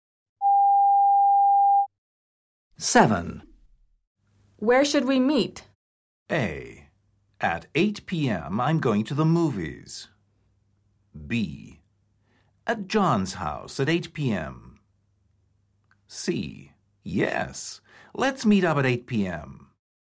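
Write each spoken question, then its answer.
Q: Where should we meet?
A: B: At John's house at 8 p.m.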